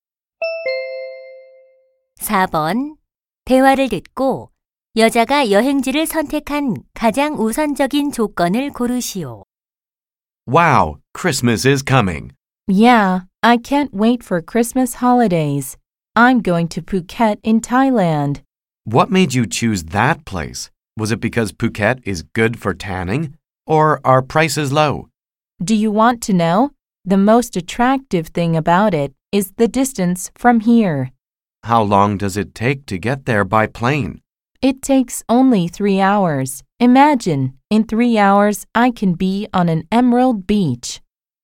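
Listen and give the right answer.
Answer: 거리(가까움)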